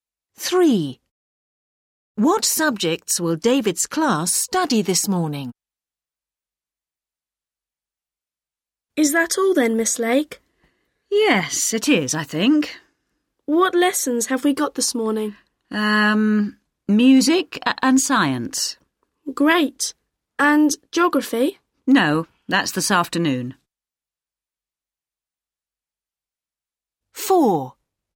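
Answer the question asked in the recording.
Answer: music and science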